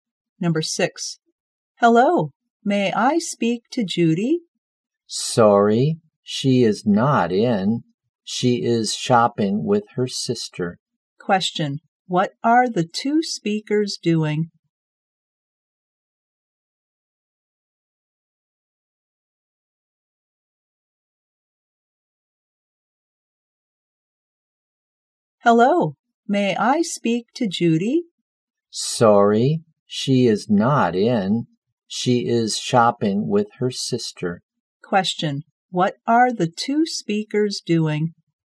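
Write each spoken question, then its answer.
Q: what are the two speakers doing?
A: Talking on the phone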